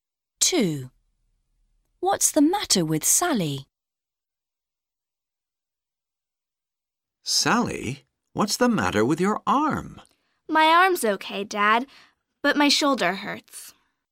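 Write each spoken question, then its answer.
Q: What's the matter with Sally?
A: Her shoulder hurts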